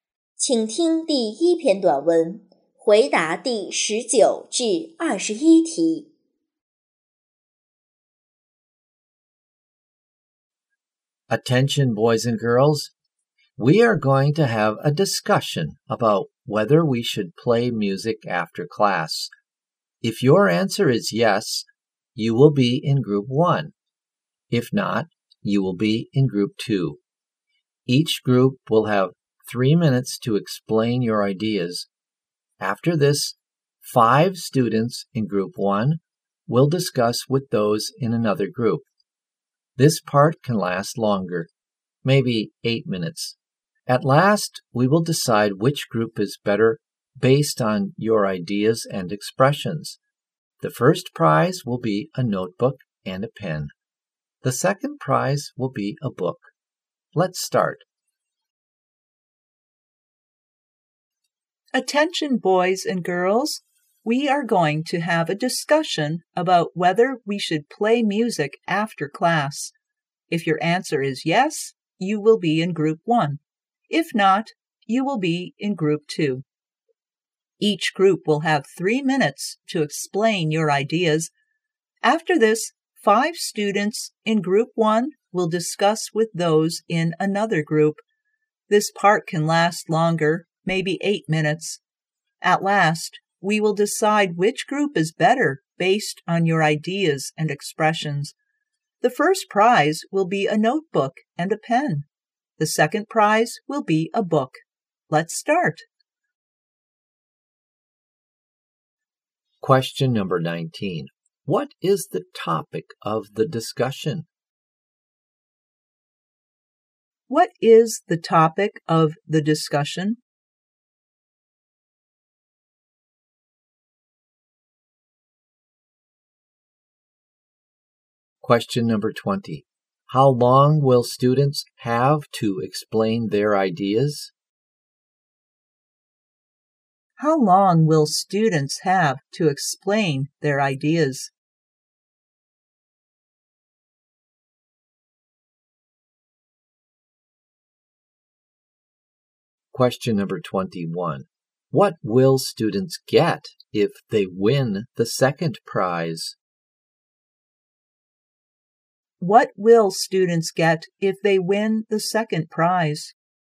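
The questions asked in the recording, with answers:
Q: What is the topic of the discussion?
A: Whether we should play music after class

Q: How long will students have to explain their ideas?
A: 3 minutes

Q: What will students get if they win the second prize?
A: A book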